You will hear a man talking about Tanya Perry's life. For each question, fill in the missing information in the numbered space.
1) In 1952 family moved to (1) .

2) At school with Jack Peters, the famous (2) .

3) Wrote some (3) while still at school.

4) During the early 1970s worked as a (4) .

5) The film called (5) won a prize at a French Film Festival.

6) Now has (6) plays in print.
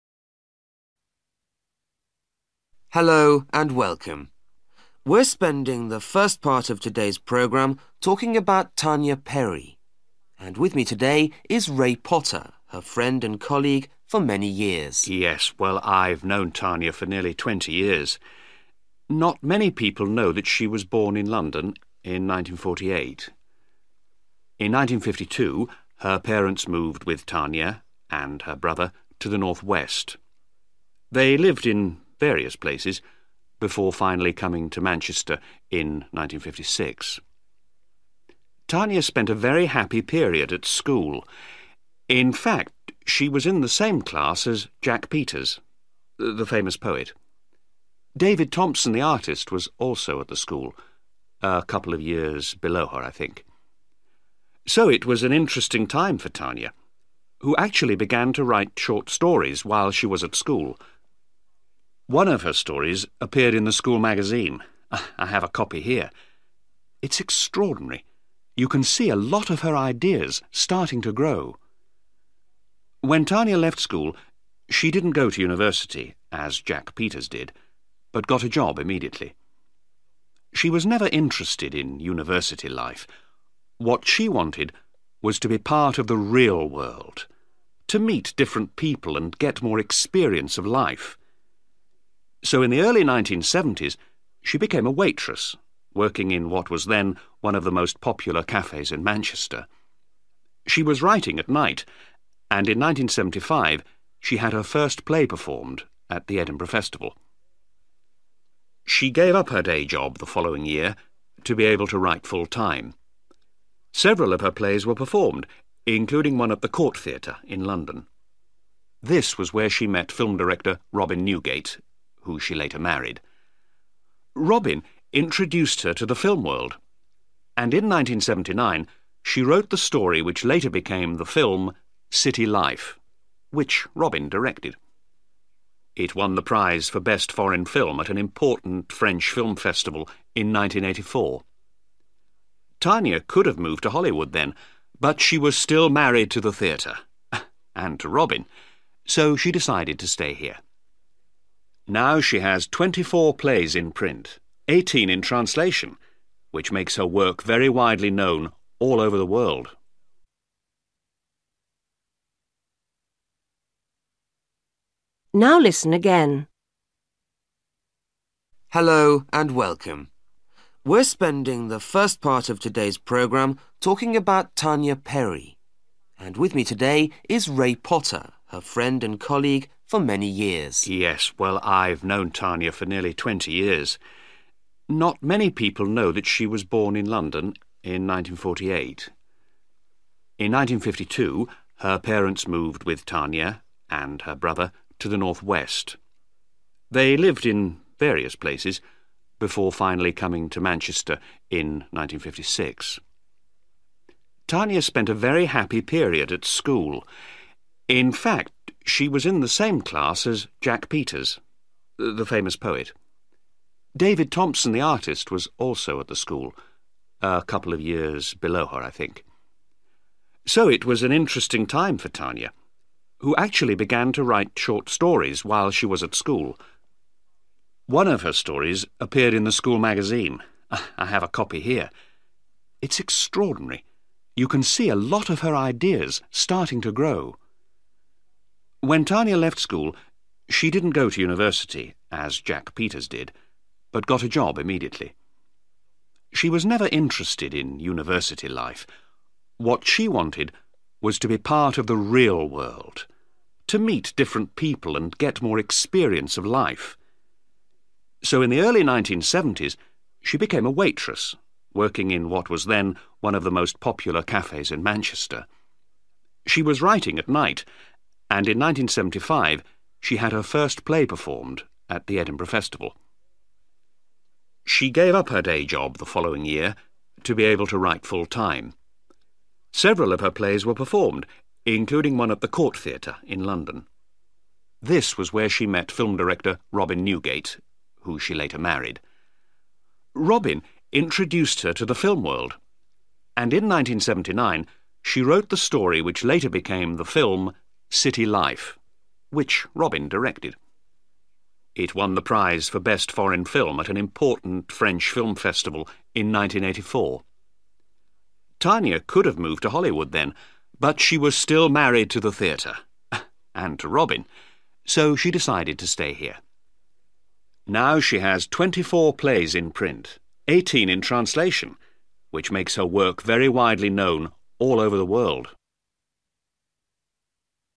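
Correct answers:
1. the Northwest
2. poet
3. short stories
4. waitress
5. City Life
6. 24

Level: Luyện nghe trình độ B1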